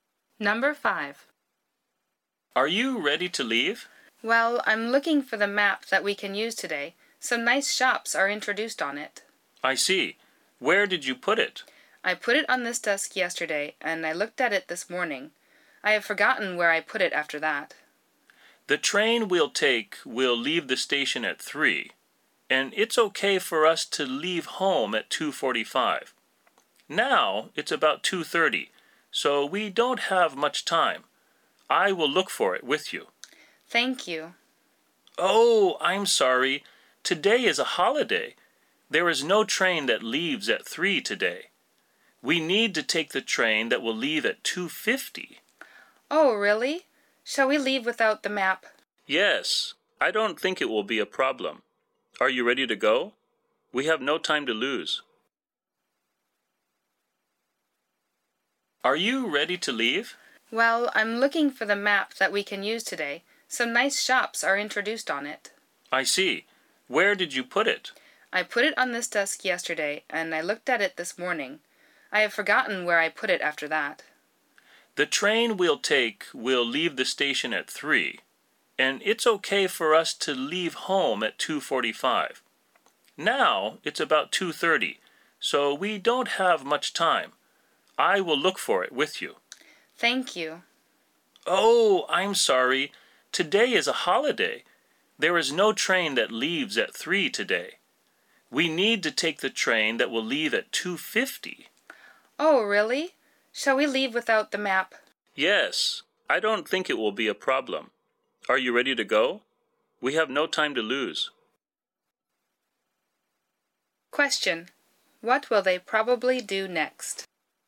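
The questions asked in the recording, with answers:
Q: What will they probably do next?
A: Leave home without the map.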